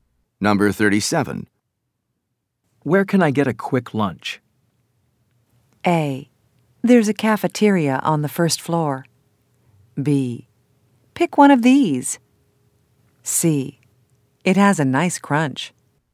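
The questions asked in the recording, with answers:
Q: Where can I get a quick lunch?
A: A: There's a cafeteria on the first floor.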